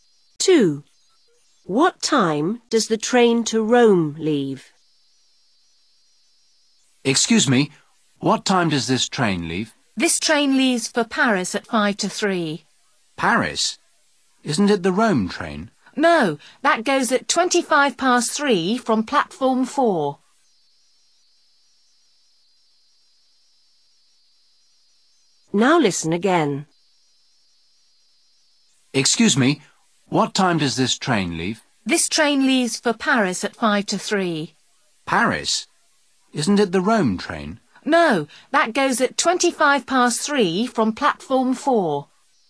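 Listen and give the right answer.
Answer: 3:25

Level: lớp 6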